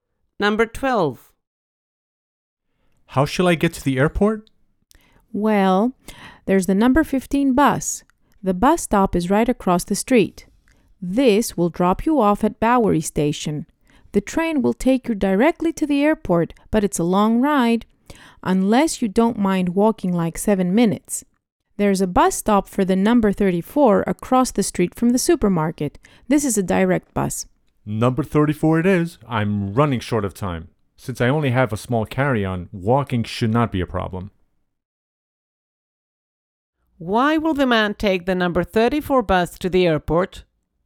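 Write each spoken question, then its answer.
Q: Why will the man take the number 34 bus to the airport?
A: It is a direct bus and he is short of time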